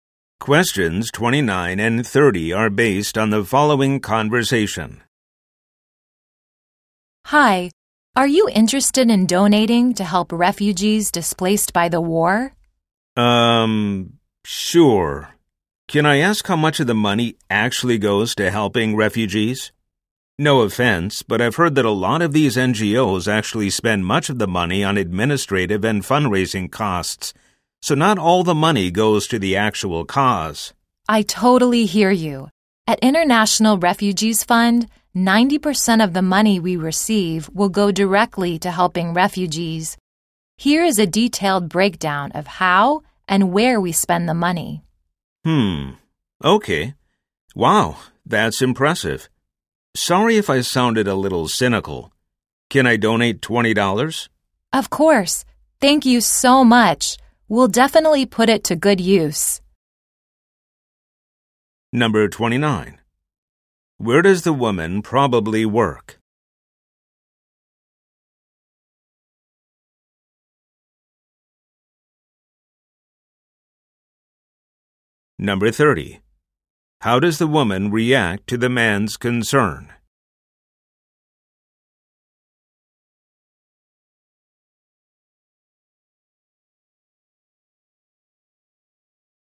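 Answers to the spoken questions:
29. At a refugee charity (International Refugees Fund)
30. She shows him a breakdown of spending: 90% goes to refugees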